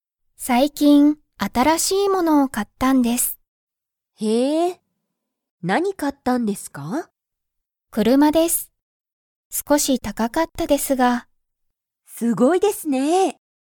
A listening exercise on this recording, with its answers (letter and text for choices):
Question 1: 山田(やまだ)さんは____を買(か)った。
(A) 映画(えいが)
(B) お金(かね)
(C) すごいもの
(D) 車(くるま)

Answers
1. (D) 車(くるま)

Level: Level 1